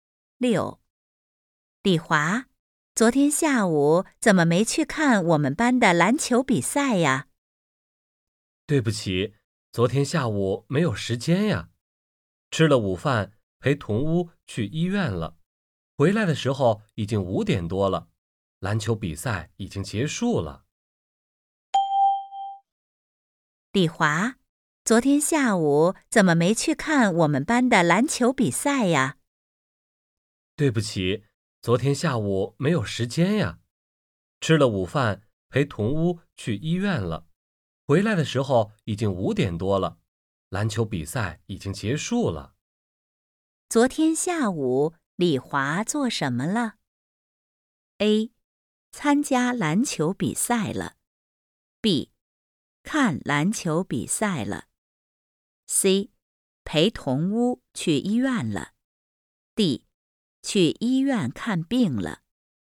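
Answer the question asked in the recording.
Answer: C: 陪同屋去医院了。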